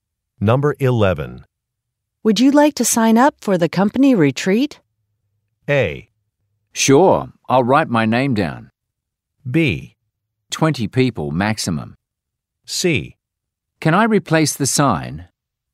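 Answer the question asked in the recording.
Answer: A: Sure, I'll write my name down.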